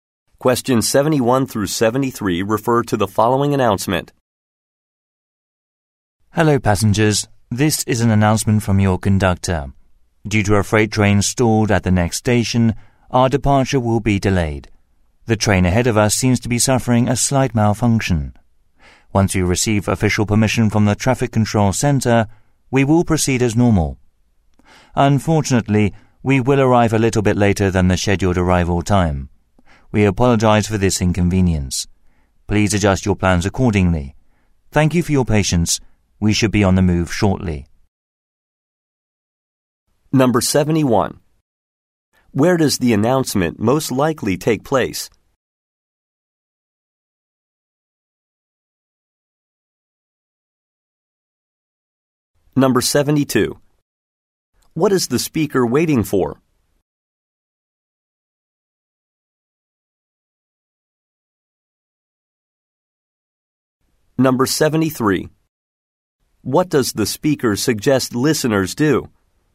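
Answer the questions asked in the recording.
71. On a train
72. Official permission from the Traffic Control Center
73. Adjust their plans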